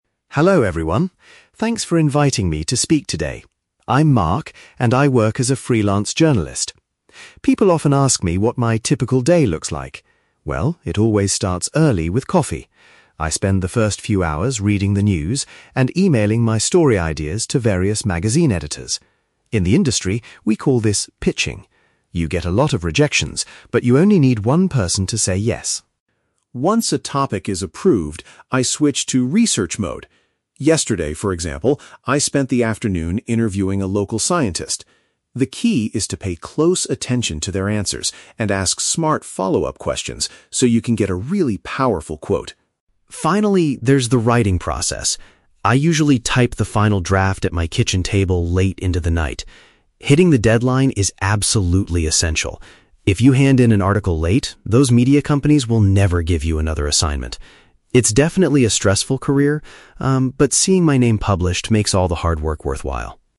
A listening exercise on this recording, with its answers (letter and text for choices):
Listen to a freelance journalist talking about his job. Choose the correct answer (A, B, or C) for each question.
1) What does the speaker typically do first in the morning?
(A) He meets with his boss at a newspaper office.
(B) He sends his article suggestions to different publishers.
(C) He conducts interviews with local scientists.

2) According to Mark, what is an important skill when doing an interview?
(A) Listening carefully to what the person is saying.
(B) Recording the conversation on a high-quality device.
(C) Asking the magazine editors the right follow-up questions.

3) Why is finishing the work on time so critical for him?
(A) Because he will not be paid for any extra hours he works.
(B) Because his kitchen table is needed for family dinners.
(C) Because failing to do so means losing future job opportunities.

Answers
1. (B) He sends his article suggestions to different publishers.
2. (A) Listening carefully to what the person is saying.
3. (C) Because failing to do so means losing future job opportunities.

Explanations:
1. Mark says he spends the morning "emailing my story ideas to various magazine editors". Option B perfectly paraphrases this (article suggestions = story ideas; publishers = magazine editors). Option A is not mentioned (he is "freelance", meaning he works for himself, not at an office). Option C is the Trap: He does interview a scientist, but he did that in the "afternoon" yesterday, not as his first morning task.
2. Mark states that the key is to "pay close attention to their answers". Option A uses synonyms to express this exact idea (listening carefully = pay close attention). Option B is a plausible real-life action for a journalist, but it is not mentioned in the audio. Option C is the Trap: The phrase "follow-up questions" is used in the audio, but he asks the interviewee (the scientist), not the "magazine editors".
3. Mark explains that if you submit an article late, "those media companies will never give you another assignment". Option C summarizes this consequence accurately (losing future job opportunities = never give you another assignment). Option A is not mentioned. Option B is the Trap: The "kitchen table" is mentioned as the place where he writes late at night, but it has nothing to do with why deadlines are important.

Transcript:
Journalist: Hello everyone. Thanks for inviting me to speak today. I'm Mark, and I work as a freelance journalist. People often ask me what my typical day looks like. Well, it always starts early with coffee. I spend the first few hours reading the news and emailing my story ideas to various magazine editors. In the industry, we call this 'pitching'. You get a lot of rejections, but you only need one person to say yes.
Once a topic is approved, I switch to research mode. Yesterday, for example, I spent the afternoon interviewing a local scientist. The key is to pay close attention to their answers and ask smart follow-up questions so you can get a really powerful quote.
Finally, there's the writing process. I usually type the final draft at my kitchen table late into the night. Hitting the deadline is absolutely essential. If you hand in an article late, those media companies will never give you another assignment. It's definitely a stressful career, um, but seeing my name published makes all the hard work worthwhile.